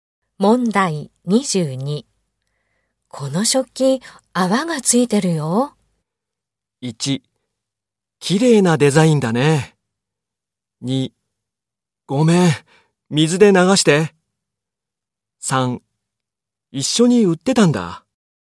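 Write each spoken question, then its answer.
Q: この食器、泡がついてるよ。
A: 2: ごめん、水で流して。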